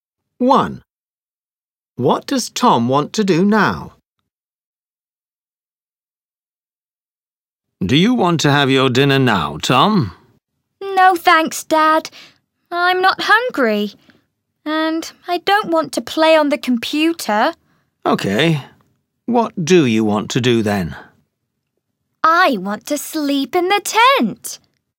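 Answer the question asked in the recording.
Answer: Sleep in the tent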